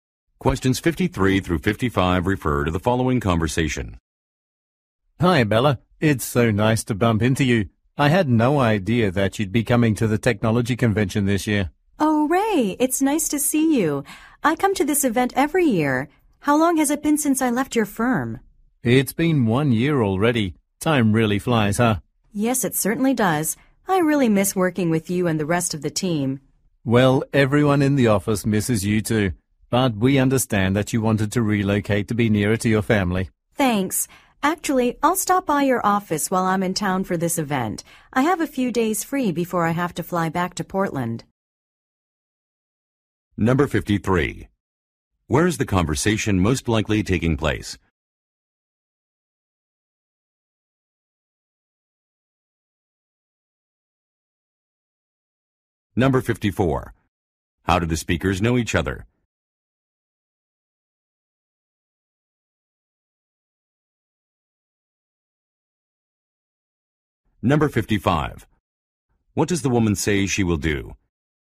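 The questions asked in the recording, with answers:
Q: Where is the conversation most likely taking place?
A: At a technology convention

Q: How do the speakers know each other?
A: They used to work together

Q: What does the woman say she will do?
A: Stop by the office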